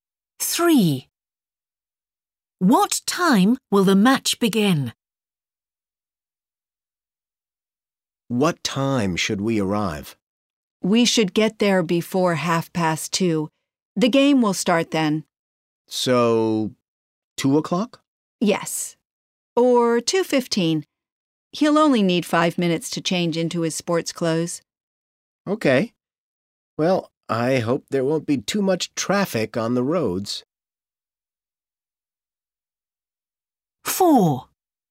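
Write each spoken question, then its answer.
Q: What time will the match begin?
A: 2:30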